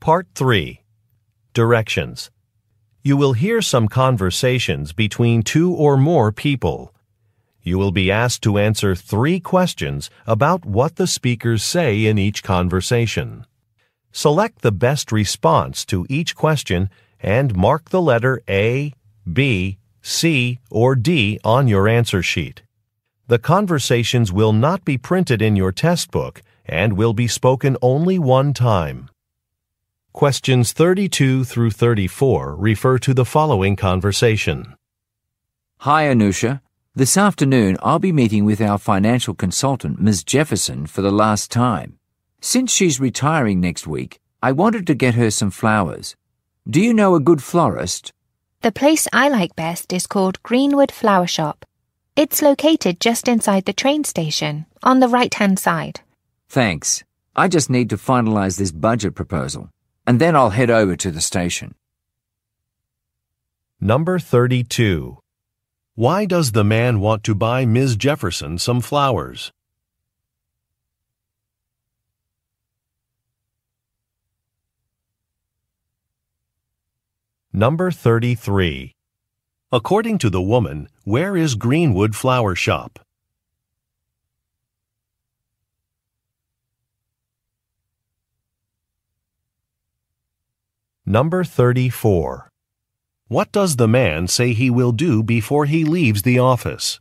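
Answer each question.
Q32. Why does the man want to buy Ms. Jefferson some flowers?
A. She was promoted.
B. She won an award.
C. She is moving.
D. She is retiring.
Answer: D. She is retiring.

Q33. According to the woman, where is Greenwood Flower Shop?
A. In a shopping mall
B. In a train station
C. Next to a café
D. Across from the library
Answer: B. In a train station

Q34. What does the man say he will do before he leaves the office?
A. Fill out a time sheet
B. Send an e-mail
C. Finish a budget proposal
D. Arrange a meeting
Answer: C. Finish a budget proposal

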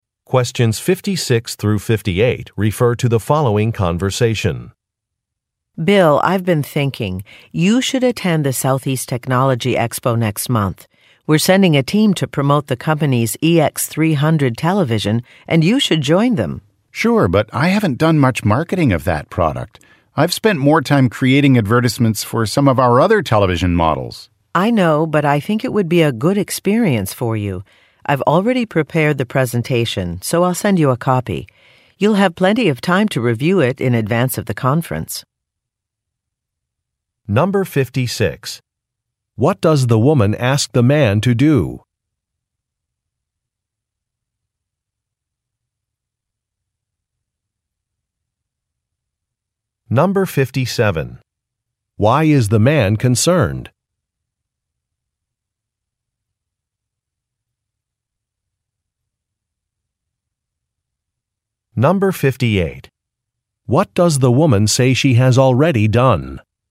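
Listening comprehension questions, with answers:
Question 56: What does the woman ask the man to do?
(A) Visit company headquarters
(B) Participate in a conference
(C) Complete a technical design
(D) Submit a proposal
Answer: (B) Participate in a conference

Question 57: Why is the man concerned?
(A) He is not very familiar with a product.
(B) He has not registered for a conference.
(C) He has missed an important deadline.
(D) He was planning to take a vacation.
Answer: (A) He is not very familiar with a product.

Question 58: What does the woman say she has already done?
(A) Provided feedback from a meeting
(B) Designed a new product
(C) Prepared a presentation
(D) Made a hotel reservation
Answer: (C) Prepared a presentation

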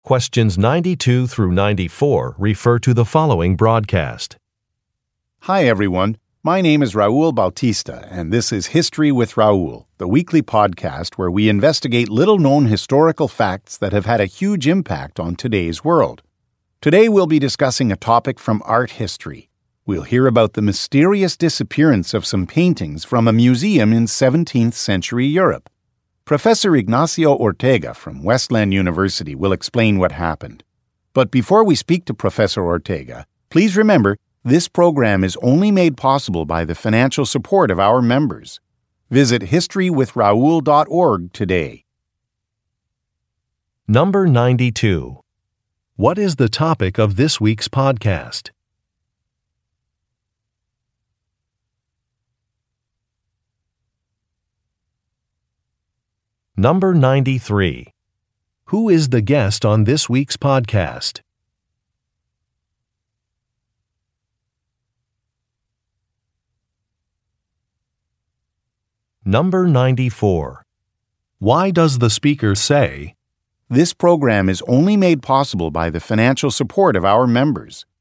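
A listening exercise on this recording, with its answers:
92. What is the topic of this week's podcast?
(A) Historical monuments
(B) Some missing paintings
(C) Classical literature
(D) European composers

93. Who is the guest on this week's podcast?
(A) An actor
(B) A travel agent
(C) A politician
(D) A professor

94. Why does the speaker say, "this program is only made possible by the financial support of our members"?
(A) To encourage the listeners to make a donation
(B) To apologize for a limited number of episodes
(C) To prevent people from getting a bonus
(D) To express concern about a proposal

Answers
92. (B) Some missing paintings
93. (D) A professor
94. (A) To encourage the listeners to make a donation

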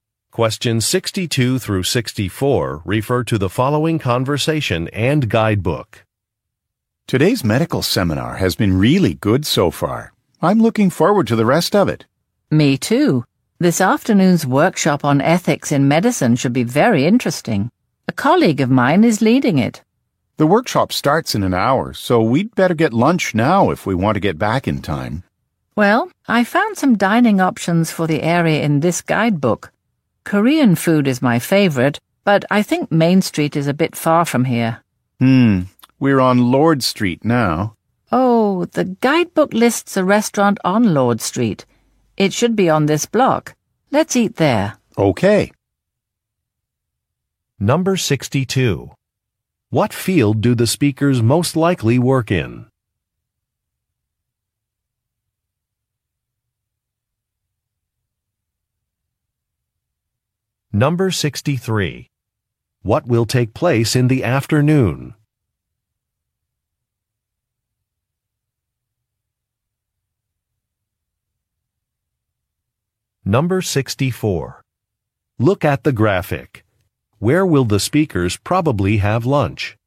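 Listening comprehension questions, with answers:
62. What field do the speakers most likely work in?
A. Technology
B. Journalism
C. Medicine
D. Agriculture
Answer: C. Medicine

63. What will take place in the afternoon?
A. An interview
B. A workshop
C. A job fair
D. A trade show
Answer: B. A workshop

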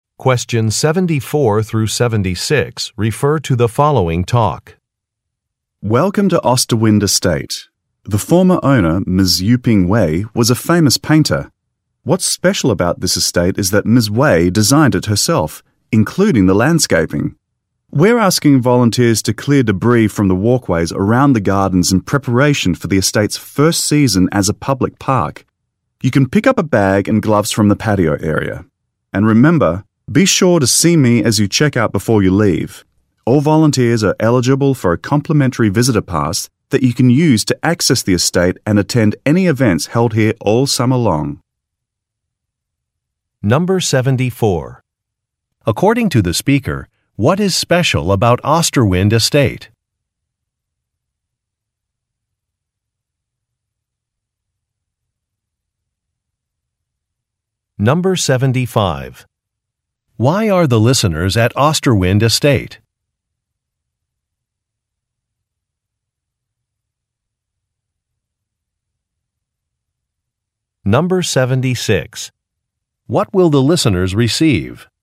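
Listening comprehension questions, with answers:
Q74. According to the speaker, what is special about Osterwind Estate?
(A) It houses many historic paintings.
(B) It was designed by its owner.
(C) It includes a botanical garden.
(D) It is used as a museum.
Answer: (B) It was designed by its owner.

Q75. Why are the listeners at Osterwind Estate?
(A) To attend an awards ceremony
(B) To apply for landscaping jobs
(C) To take a tour of a building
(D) To clean up some gardens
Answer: (D) To clean up some gardens

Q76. What will the listeners receive?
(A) Gift-shop coupons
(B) Free passes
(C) Lunch boxes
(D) T-shirts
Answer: (B) Free passes

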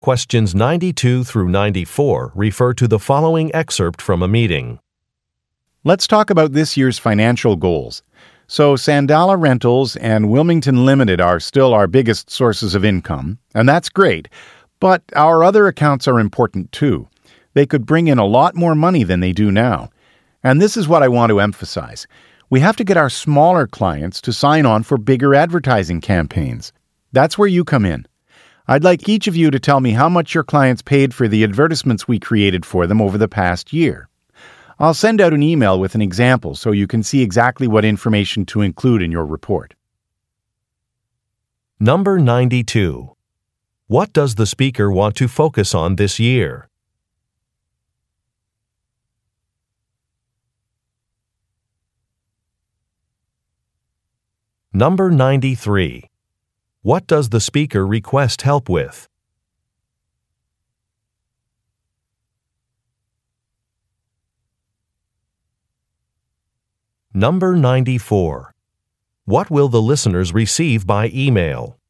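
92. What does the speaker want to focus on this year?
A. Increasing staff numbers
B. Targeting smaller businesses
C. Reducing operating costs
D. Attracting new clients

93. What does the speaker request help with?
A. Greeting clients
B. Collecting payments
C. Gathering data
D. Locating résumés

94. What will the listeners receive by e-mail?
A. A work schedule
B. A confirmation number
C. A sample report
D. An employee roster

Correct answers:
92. B. Targeting smaller businesses
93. C. Gathering data
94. C. A sample report

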